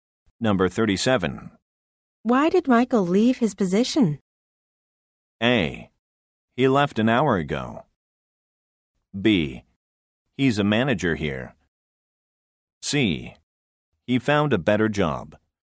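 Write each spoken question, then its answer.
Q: Why did Michael leave his position?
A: C: He found a better job.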